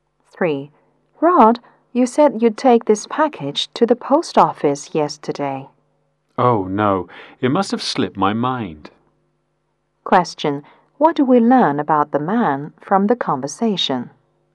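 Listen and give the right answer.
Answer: He forgot to take the package to the post office.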